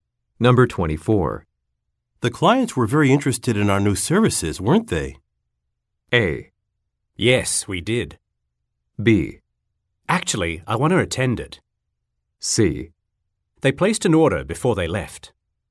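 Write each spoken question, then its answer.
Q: The clients were very interested in our new services, weren't they?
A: C: They placed an order before they left.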